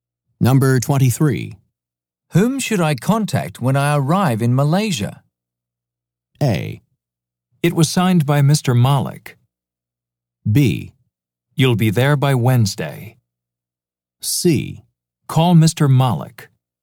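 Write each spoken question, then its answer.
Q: Whom should I contact when I arrive in Malaysia?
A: C: Call Mr. Malik.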